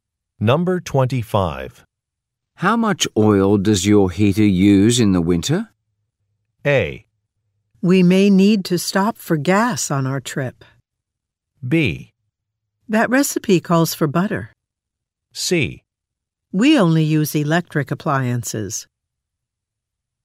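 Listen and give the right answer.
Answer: C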